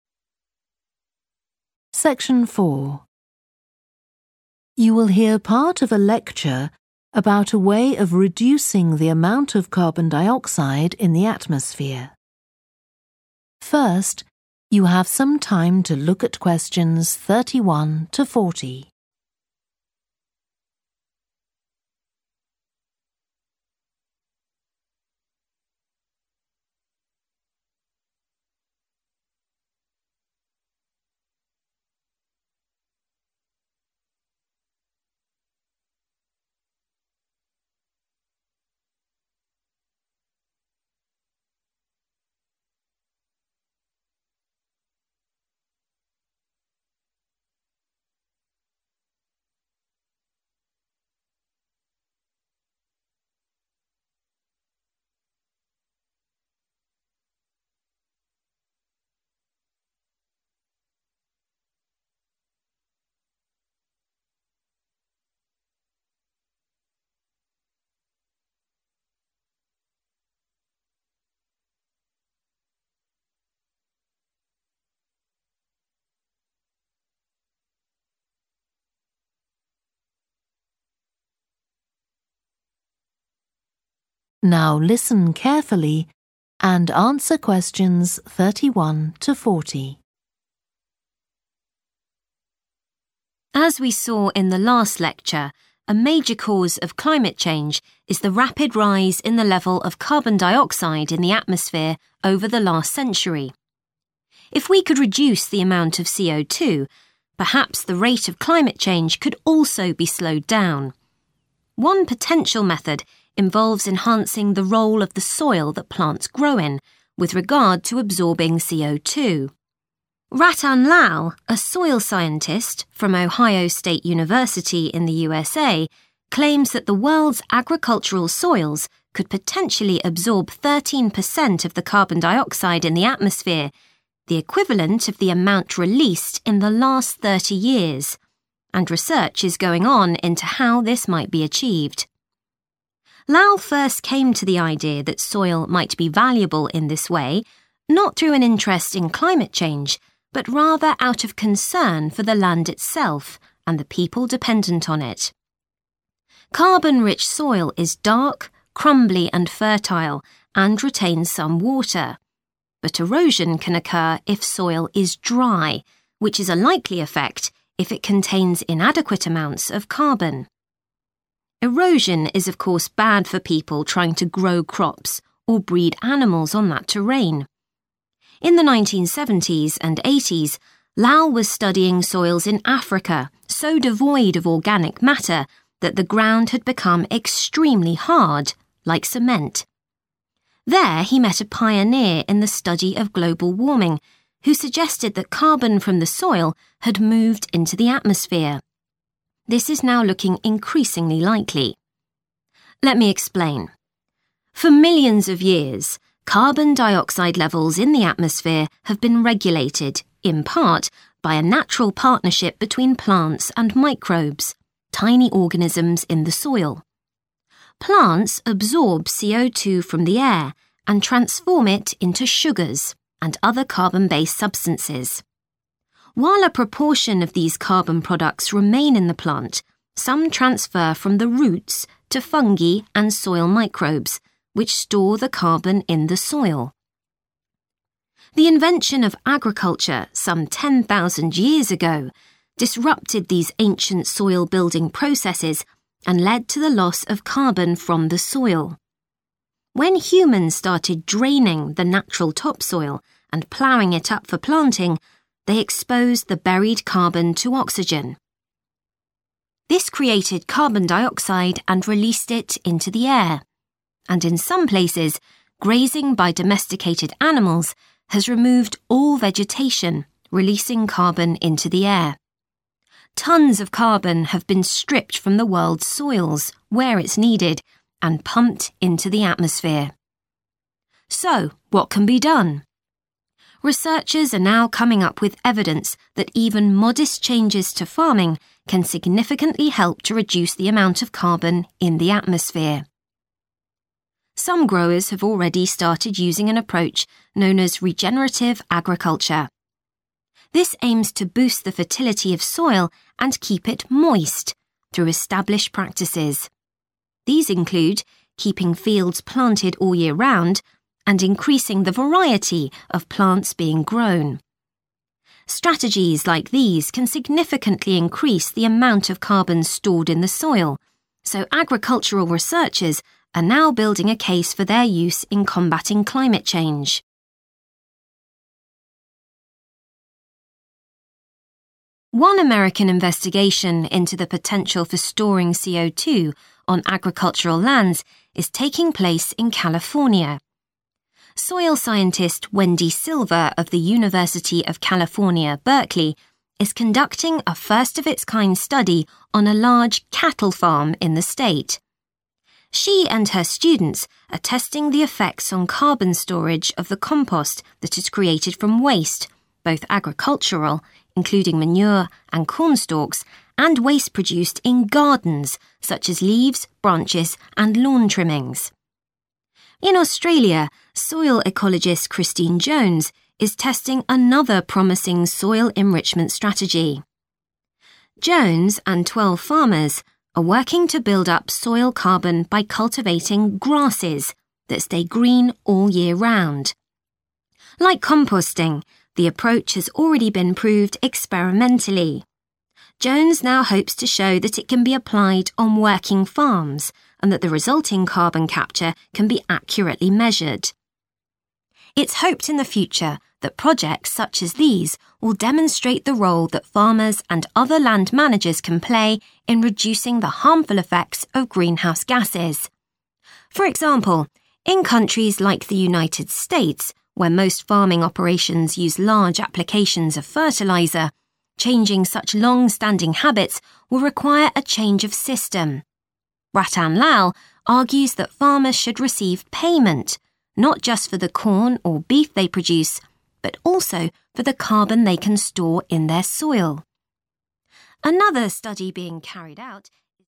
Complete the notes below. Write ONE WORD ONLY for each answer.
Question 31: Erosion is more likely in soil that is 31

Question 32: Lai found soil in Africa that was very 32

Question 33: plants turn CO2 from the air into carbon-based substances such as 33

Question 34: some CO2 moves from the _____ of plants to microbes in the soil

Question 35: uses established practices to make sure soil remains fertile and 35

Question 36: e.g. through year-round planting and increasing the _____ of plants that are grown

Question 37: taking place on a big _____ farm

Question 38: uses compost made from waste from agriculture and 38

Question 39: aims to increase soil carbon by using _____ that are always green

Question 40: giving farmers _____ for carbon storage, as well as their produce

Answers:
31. dry
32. hard
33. sugar / sugars
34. roots
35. moist / damp / wet
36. variety
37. cattle
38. gardens / gardening
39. grasses
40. payment / payments / money

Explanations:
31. The correct answer is 'dry' because dry soil is more prone to erosion, as moisture helps hold the soil particles together and prevent them from being easily washed away.
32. The correct answer is 'hard' because it directly relates to the description of the soil in the excerpt, emphasizing its lack of organic matter and resulting compactness.
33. The correct answer is 'sugars' because the excerpt says plants turn carbon dioxide into 'sugars' and 'other carbon-based substances.' This means 'sugars' is one example of a carbon-based substance that plants make.
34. The correct answer 'roots' is right because the excerpt says that some carbon moves from the 'roots' of plants to the soil. This means the carbon is traveling from the plant's roots down to the ground.
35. The correct answer is 'moist' because maintaining moisture in the soil is crucial for its fertility and productivity, aligning with the idea of keeping the soil 'moist' in the text.
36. The correct answer fits because increasing plant variety can contribute to regenerative agriculture by improving soil health and potentially enhancing carbon sequestration, as different plants have varying abilities to capture and store carbon in the soil.
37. The correct answer is 'cattle' because the term 'large cattle farm' directly indicates that the study is focused on a farm where cattle are kept. Cattle are an essential part of agricultural practices, and studying their impact on soil carbon is significant in the context of the overall discussion about soil and carbon management.
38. The correct answer aligns with the context of waste being produced in gardens, which is related to the activity of gardening. It fits the information provided in the excerpt.
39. The correct answer aligns with the information provided in the excerpt, where it mentions cultivating grasses that stay green year-round to enhance soil carbon levels.
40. The correct answer aligns with the idea in the excerpt that farmers should be compensated financially for the carbon storage potential of their soil, emphasizing the importance of recognizing and incentivizing practices that benefit the environment.

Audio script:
As we saw in the last lecture, a major cause of climate change is the rapid rise in the level of carbon dioxide in the atmosphere over the last century. If we could reduce the amount of CO2, perhaps the rate of climate change could also be slowed down. One potential method involves enhancing the role of the soil that plants grow in, with regard to absorbing CO2. Rattan Lal, a soil scientist from Ohio Stage University, in the USA, claims that the world's agricultural soils could potentially absorb 13 per cent of the carbon dioxide in the atmosphere – the equivalent of the amount released in the last 3o years. And research is going on into how this might be achieved.
Lal first came to the idea that soil might be valuable in this way not through an interest in climate change, but rather out of concern for the land itself and the people dependent on it. Carbon-rich soil is dark, crumbly and fertile, and retains some water. But erosion can occur if soil is dry, which is a likely effect if it contains inadequate amounts of carbon. Erosion is of course bad for people trying to grow crops or breed animals on that terrain. In the 1970s and '80s, Lal was studying soils in Africa so devoid of organic matter that the ground had become extremely hard, like cement. There he met a pioneer in the study of global warming, who suggested that carbon from the soil had moved into the atmosphere. This is now looking increasingly likely.
Let me explain. For millions of years, carbon dioxide levels in the atmosphere have been regulated, in part, by a natural partnership between plants and microbes – tiny organisms in the soil. Plants absorb CO2 from the air and transform it into sugars and other carbon-based substance. While a proportion of these carbon products remain in the plant, some transfer from the roots to fungi and soil microbes, which store the carbon in the soil.
The invention of agriculture some 10,000 years ago disrupted these ancient soil-building processes and led to the loss of carbon from the soil. When humans started draining the natural topsoil, and ploughing it up for planting, they exposed the buried carbon to oxygen. This created carbon dioxide and released it into the air. And in some places, grazing by domesticated animals has removed all vegetation, releasing carbon into the air. Tons of carbon have been stripped from the world's soils – where it's needed – and pumped into the atmosphere.
So what can be done? Researchers are now coming up with evidence that even modest changes to farming can significantly help to reduce the amount of carbon in the atmosphere.
Some growers have already started using an approach known as regenerative agriculture. This aims to boost the fertility of soil and keep it moist through established practices. These include keeping fields planted all year round, and increasing the variety of plants being grown. Strategies like these can significantly increase the amount of carbon stored in the soil, so agricultural researchers are now building a case for their use in combating climate change.
One American investigation into the potential for storing CO2 on agricultural lands is taking place in California. Soil scientist Whendee Silver of the University of California, Berkeley, is conducting a first-of-its-kind study on a large cattle farm in the state. She and her students are testing the effects on carbon storage of the compost that is created from waste – both agricultural, including manure and cornstalks, and waste produced in gardens, such as leaves, branches, and lawn trimmings.
In Australia, soil ecologist Christine Jones is testing another promising soil-enrichment strategy. Jones and 12 farmers are working to build up soil carbon by cultivating grasses that stay green all year round. Like composting, the approach has already been proved experimentally; Jones now hopes to show that it can be applied on working farms and that the resulting carbon capture can be accurately measured.
It's hoped in the future that projects such as these will demonstrate the role that farmers and other land managers can play in reducing the harmful effects of greenhouse gases. For example, in countries like the United States, where most farming operations use large applications of fertiliser, changing such long-standing habits will require a change of system. Rattan Lal argues that farmers should receive payment not just for the corn or beef they produce but also for the carbon they can store in their soil.
Another study being carried out ...